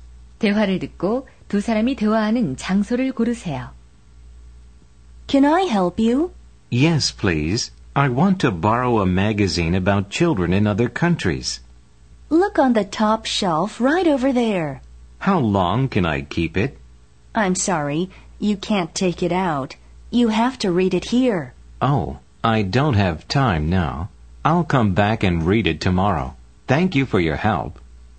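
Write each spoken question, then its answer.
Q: 대화를 듣고 두 사람이 대화하는 장소를 고르세요.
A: 도서관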